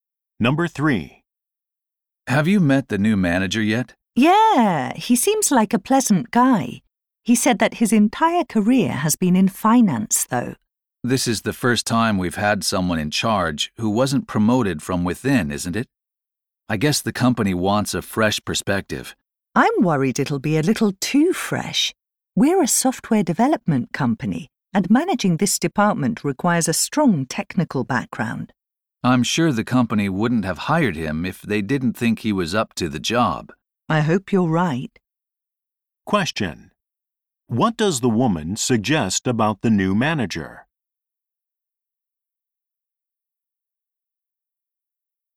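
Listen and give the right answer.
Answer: He may not have the technical background to manage the department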